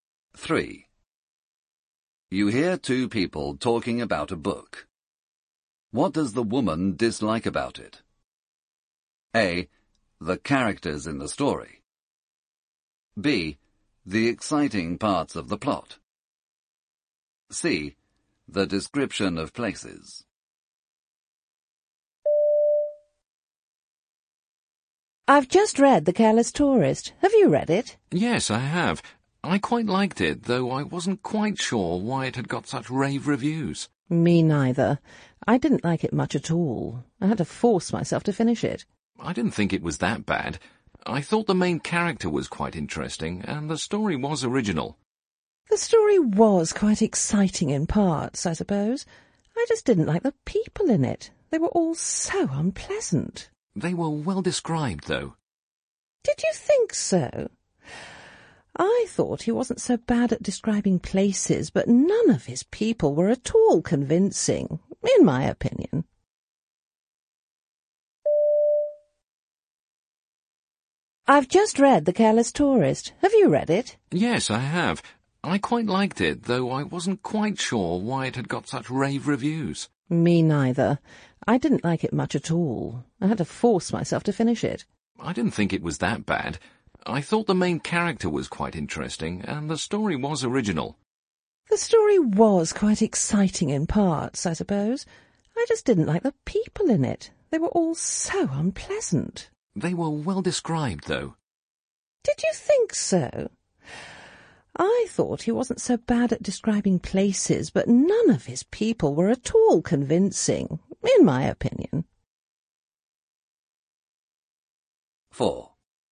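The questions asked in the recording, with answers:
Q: What does the woman dislike about it?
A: A: The characters in the story.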